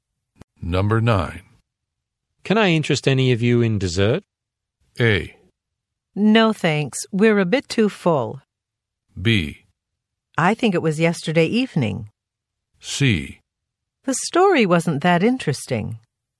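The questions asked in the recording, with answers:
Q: Can I interest any of you in dessert?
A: A: No, thanks. We're a bit too full.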